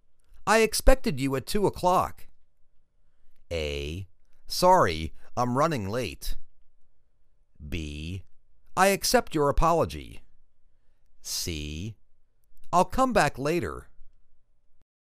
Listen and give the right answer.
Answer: Sorry, I'm running late.